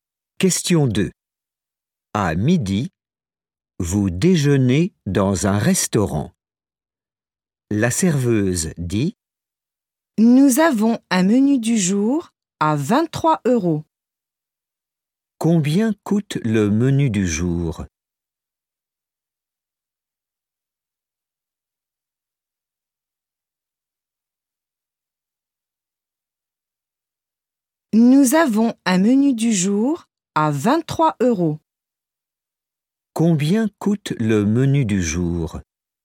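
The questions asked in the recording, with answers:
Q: Combien coûte le menu du jour?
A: 23 euros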